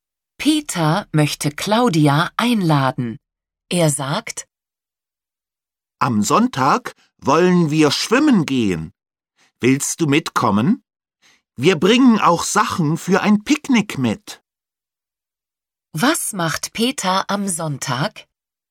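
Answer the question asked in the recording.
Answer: Er geht schwimmen (mit Picknick)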